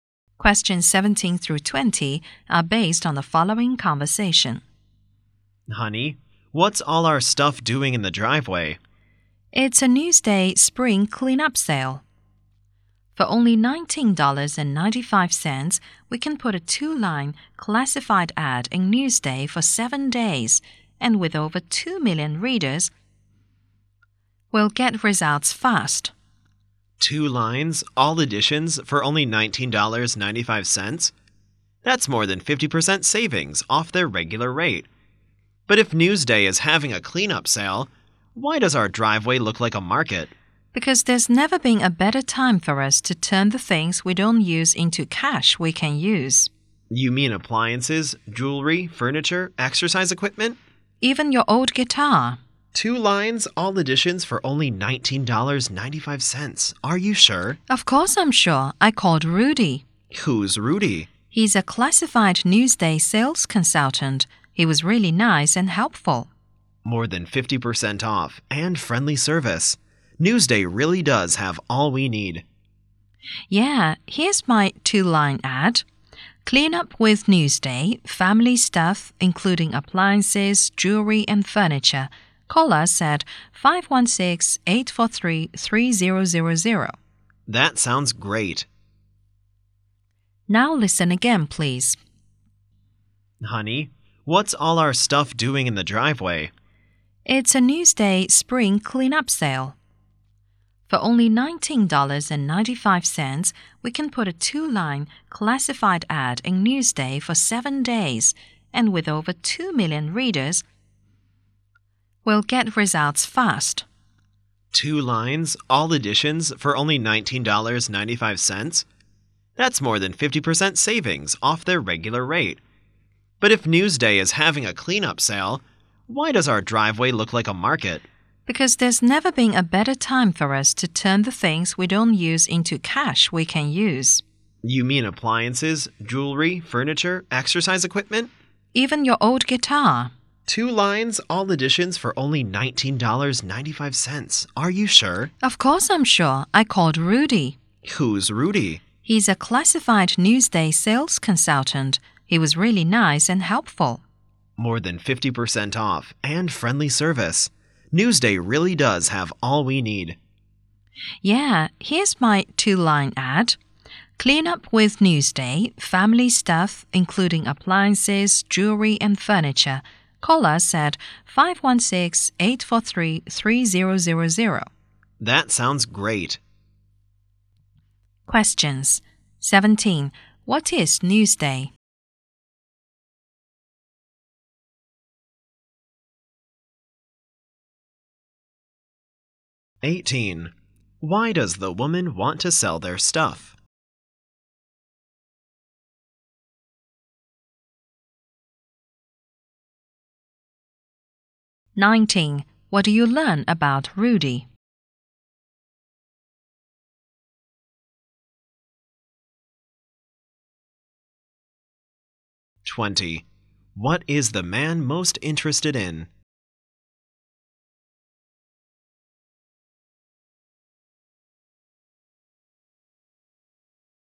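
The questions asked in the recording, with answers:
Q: What is Newsday?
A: A newspaper.

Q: Why does the woman want to sell their stuff?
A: To turn things they don't use into cash.

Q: What do you learn about Rudy?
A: He is a Newsday classified sales consultant who was nice and helpful.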